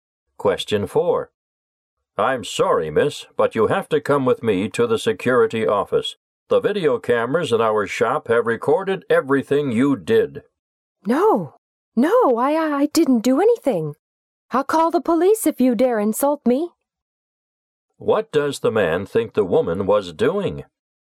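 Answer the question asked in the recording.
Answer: Stealing from the shop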